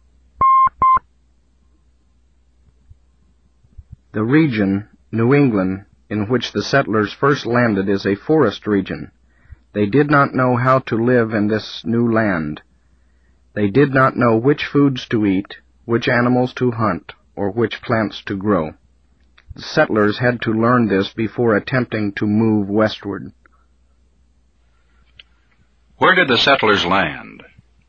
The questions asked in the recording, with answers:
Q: Where did the settlers land?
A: At a forest region. The settlers landed at a forest region.